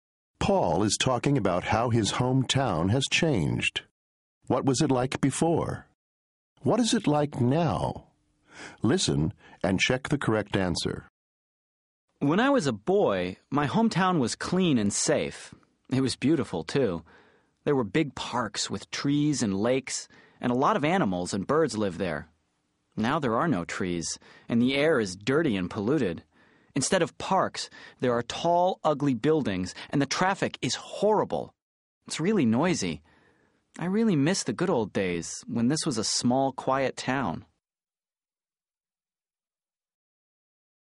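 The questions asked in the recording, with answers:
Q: What was it like before?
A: Clean, safe and beautiful, with big parks, trees, lakes and many animals and birds

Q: What is it like now?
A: Dirty, polluted and noisy, with tall ugly buildings and horrible traffic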